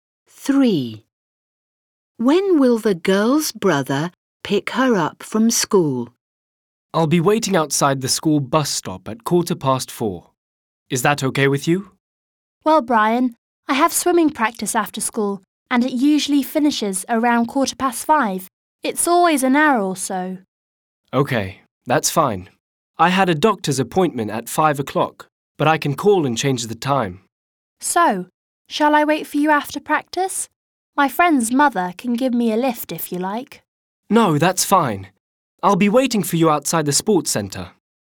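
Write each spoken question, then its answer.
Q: When will the girl's brother pick her up from school?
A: Around 5:15, after her swimming practice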